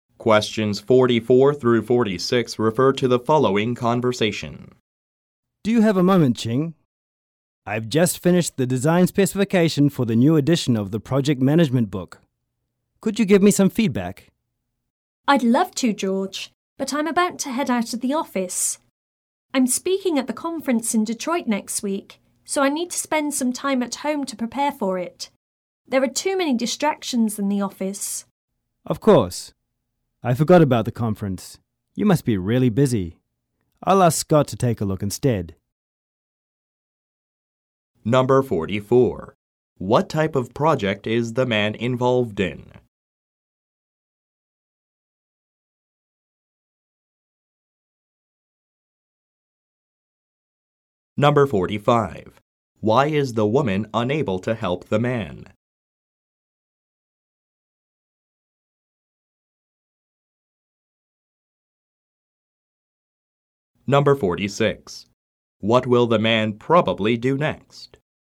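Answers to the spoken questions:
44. Designing a new edition of a project management book
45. She is leaving the office to prepare for a conference talk
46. Ask Scott to review the design specification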